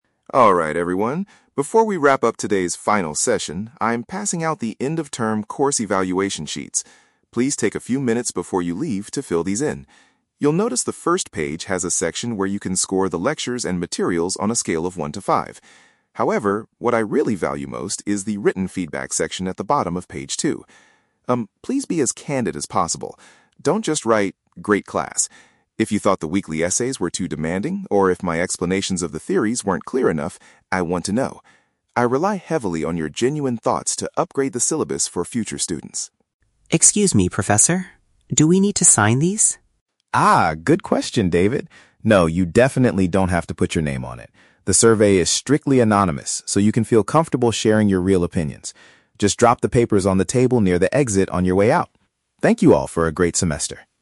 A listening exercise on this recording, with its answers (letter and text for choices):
Listen to a lecturer talking to his students at the end of a course. Choose the correct answer (A, B, or C).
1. What does the professor want the students to focus on the most?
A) Giving the course materials a high score.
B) Providing honest written comments.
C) Reading the final essays carefully.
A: B) Providing honest written comments.

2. Why does the professor need this feedback?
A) To improve the class for the next group of learners.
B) To decide on the students' final grades.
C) To make the weekly assignments more difficult.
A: A) To improve the class for the next group of learners.

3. What is true about the evaluation forms?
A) They must be handed directly to David.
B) Students must write their names on the second page.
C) The identity of the students will be kept secret.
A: C) The identity of the students will be kept secret.

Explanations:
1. The professor says what he values most is the "written feedback section" and asks students to be "as candid as possible" and share "genuine thoughts." This is a B1 paraphrase for "honest written comments."
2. The professor states, "I rely heavily on your genuine thoughts to upgrade the syllabus for future students." "Upgrade the syllabus" means to improve the class, and "future students" means the next group of learners.
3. The professor assures David that the survey is "strictly anonymous" and they "don't have to put your name on it." This means their identities will be kept secret.

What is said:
Professor Roberts: Alright everyone, before we wrap up today's final session, I'm passing out the end-of-term course evaluation sheets. Please take a few minutes before you leave to fill these in. You'll notice the first page has a section where you can score the lectures and materials on a scale of one to five. However, what I really value most is the written feedback section at the bottom of page two. Um, please be as candid as possible. Don't just write 'great class'. If you thought the weekly essays were too demanding, or if my explanations of the theories weren't clear enough, I want to know. I rely heavily on your genuine thoughts to upgrade the syllabus for future students.
Do we need to sign these?
Professor Roberts: Ah, good question, David. No, you definitely don't have to put your name on it. The survey is strictly anonymous so you can feel comfortable sharing your real opinions.